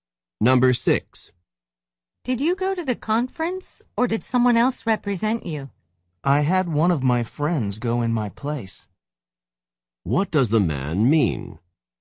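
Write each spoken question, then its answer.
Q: What does the man mean?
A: A friend went to the conference in his place.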